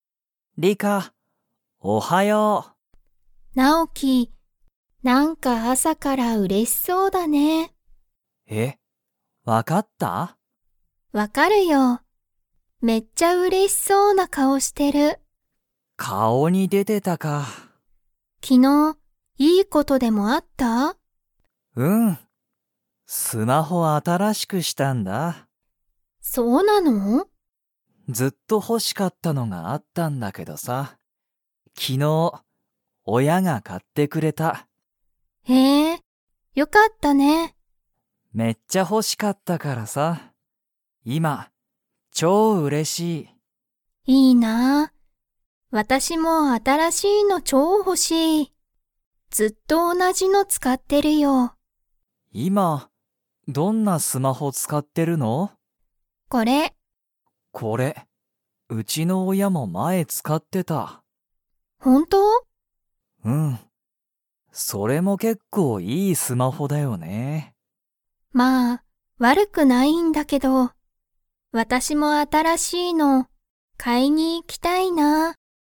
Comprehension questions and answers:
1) ナオキは昨日きのう、いい事ことがありましたか?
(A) はい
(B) いいえ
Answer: (A) はい

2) ナオキのスマホは、____が買かってくれた。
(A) ナオキの親おや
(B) ナオキの友達ともだち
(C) リカの先生せんせい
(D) リカの親おや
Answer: (A) ナオキの親おや

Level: Level 2

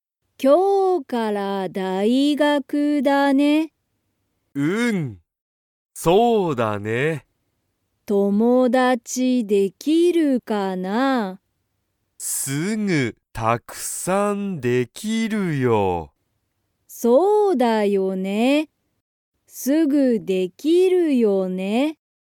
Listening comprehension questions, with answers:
タロウとトモコは、____から大学(だいがく)だ。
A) すぐ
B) 今日(きょう)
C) 一緒(いっしょ)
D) まだ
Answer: B) 今日(きょう)

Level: Level 1

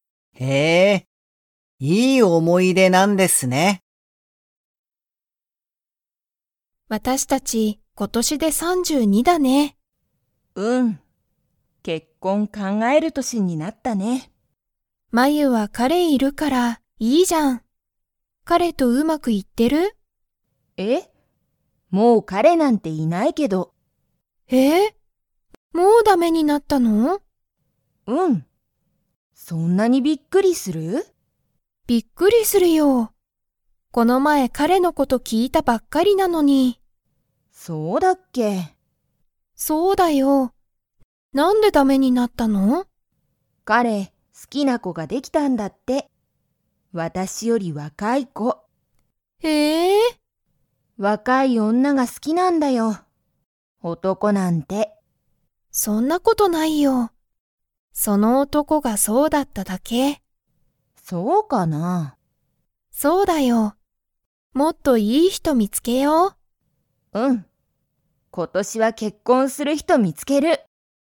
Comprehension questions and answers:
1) まゆには、今いま彼かれはいますか?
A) はい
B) いいえ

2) まゆの彼かれは、 子こができた。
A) 好すきな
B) 嫌いやな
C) 怖こわい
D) 古ふるい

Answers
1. B) いいえ
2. A) 好すきな

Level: Level 3

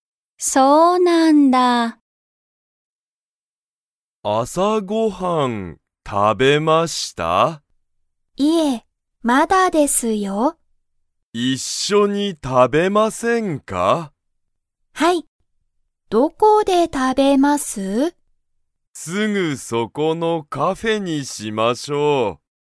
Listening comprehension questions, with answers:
小林(こばやし)さんは、朝(あさ)ご飯(はん)を食(た)べましたか?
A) はい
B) いいえ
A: B) いいえ

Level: Level 1

